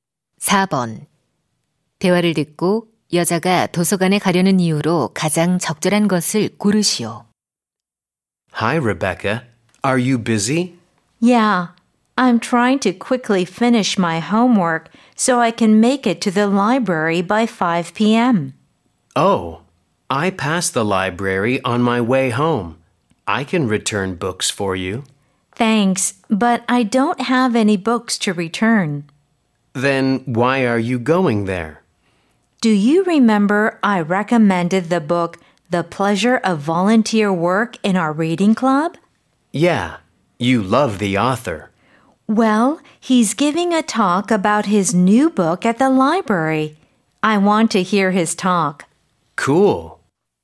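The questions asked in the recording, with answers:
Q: 대화를 듣고 여자가 도서관에 가려는 이유로 가장 적절한 것을 고르시오.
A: 좋아하는 작가의 강연을 듣기 위해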